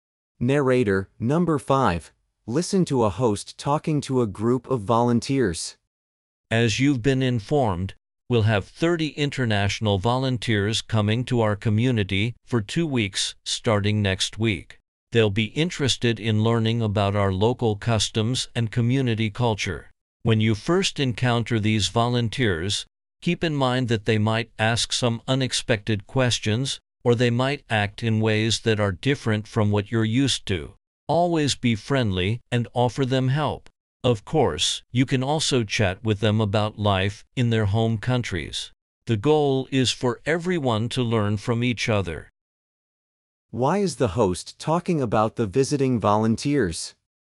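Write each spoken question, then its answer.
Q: Why is the host talking about the visiting volunteers?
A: To prepare the local volunteers to welcome and help them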